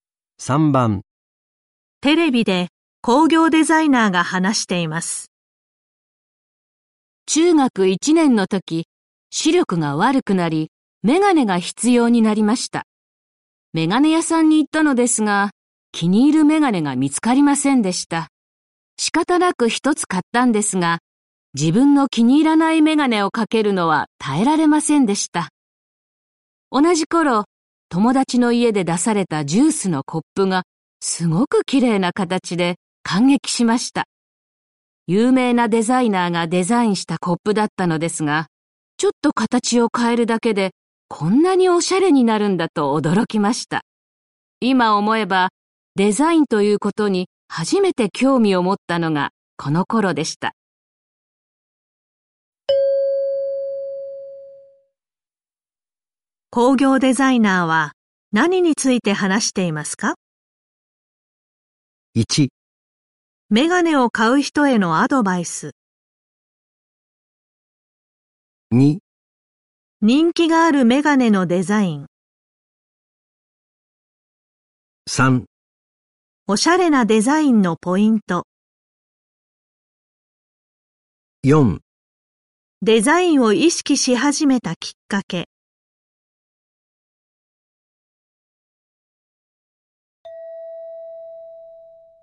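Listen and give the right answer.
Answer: 4: デザインを意識し始めたきっかけ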